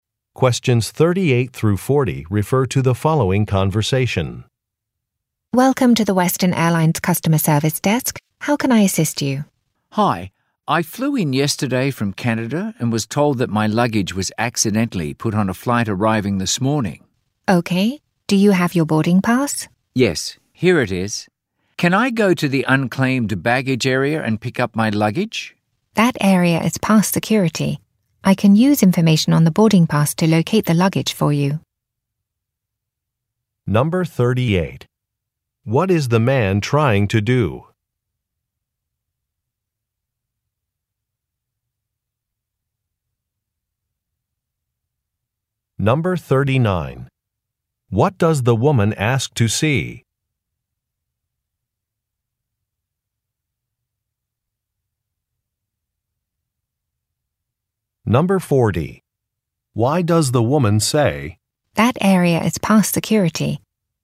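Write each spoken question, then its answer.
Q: What is the man trying to do?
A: Get his luggage that was put on a different flight

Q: What does the woman ask to see?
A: His boarding pass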